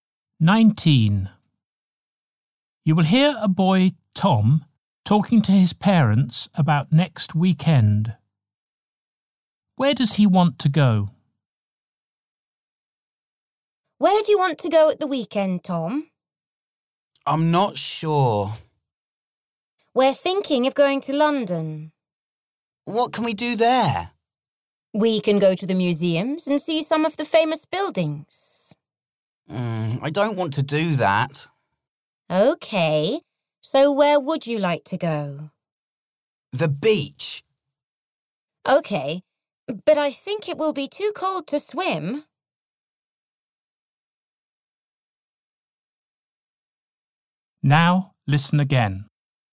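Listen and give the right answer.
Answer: The beach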